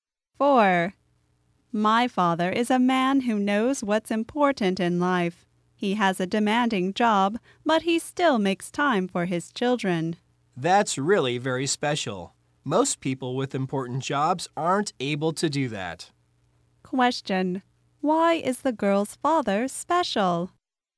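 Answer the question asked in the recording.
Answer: He has a demanding job but still makes time for his children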